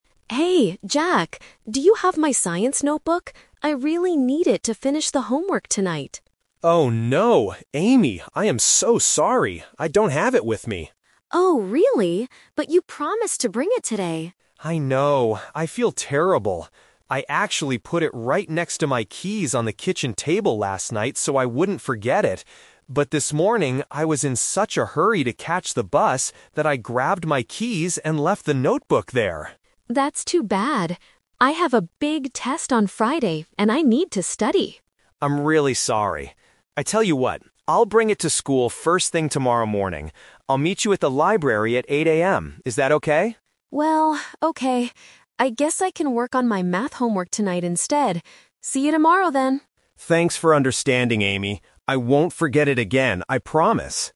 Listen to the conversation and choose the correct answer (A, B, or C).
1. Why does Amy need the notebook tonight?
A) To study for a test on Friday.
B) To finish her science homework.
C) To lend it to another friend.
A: B

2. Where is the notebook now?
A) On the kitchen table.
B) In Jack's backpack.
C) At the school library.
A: A

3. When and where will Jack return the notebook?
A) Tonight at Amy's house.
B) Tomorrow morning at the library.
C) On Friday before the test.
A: B

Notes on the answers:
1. Amy says, "I really need it to finish the homework tonight." Trap: Option (A) is a trap. She mentions a test on Friday, but the immediate reason she needs it tonight is for the homework.
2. Jack explains that he "left the notebook there" (on the kitchen table) when he rushed out. Trap: Option (B) is a common distractor. Students might assume it's in his bag since he's at school, but the "twist" is that he forgot it.
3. Jack promises, "I'll meet you at the library at 8:00 AM" (tomorrow). Trap: Option (C) is mentioned as the day of the test, and Option (A) is not suggested in the final agreement.

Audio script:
Amy: Hey, Jack! Do you have my science notebook? I really need it to finish the homework tonight.
Jack: Oh, no! Amy, I am so sorry. I don't have it with me.
Amy: Oh, really? But you promised to bring it today.
Jack: I know, I feel terrible. I actually put it right next to my keys on the kitchen table last night so I wouldn't forget it. But this morning, I was in such a hurry to catch the bus that I grabbed my keys and left the notebook there!
Amy: That's too bad. I have a big test on Friday and I need to study.
Jack: I'm really sorry. I tell you what, I'll bring it to school first thing tomorrow morning. I'll meet you at the library at 8:00 AM. Is that okay?
Amy: Well, okay. I guess I can work on my math homework tonight instead. See you tomorrow then.

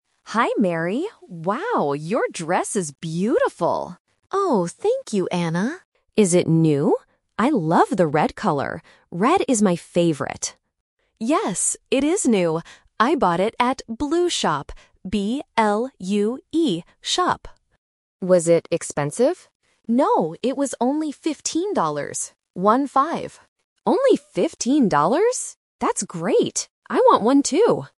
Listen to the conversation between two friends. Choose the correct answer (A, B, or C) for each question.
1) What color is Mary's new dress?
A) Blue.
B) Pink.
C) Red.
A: C

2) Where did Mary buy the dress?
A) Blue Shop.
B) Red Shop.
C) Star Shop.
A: A

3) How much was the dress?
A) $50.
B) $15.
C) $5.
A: B

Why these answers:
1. Anna clearly says: "I love the red color. Red is my favorite." Option A (Blue) is the trap because it is the name of the shop mentioned later. Option B is not mentioned.
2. Mary says she bought it at "Blue Shop" and even spells it out: "B-L-U-E Shop." Option B is the trap because it's the color of the dress. Option C is not mentioned.
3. Mary says "fifteen dollars" and repeats it as "One-five" to clarify. Anna also repeats "fifteen dollars" at the end. Option A ($50) is the trap because "fifteen" and "fifty" sound very similar to A1 learners. Option C is not mentioned.

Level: A1

